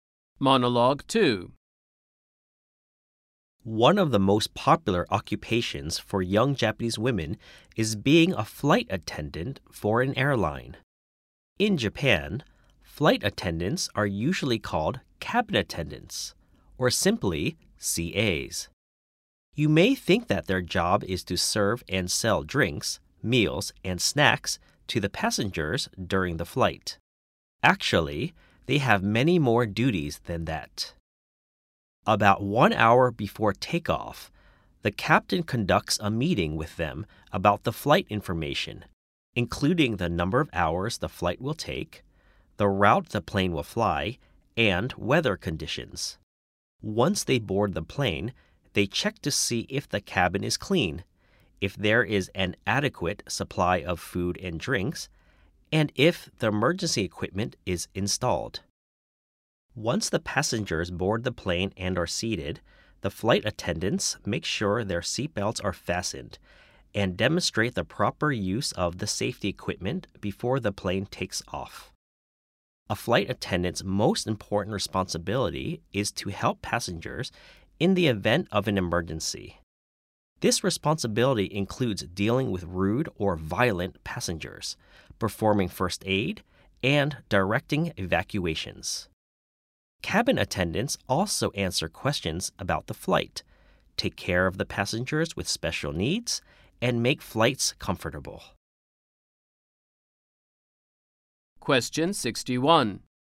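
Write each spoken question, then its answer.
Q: According to the monologue, what is the most important responsibility of a flight attendant?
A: Helping passengers in an emergency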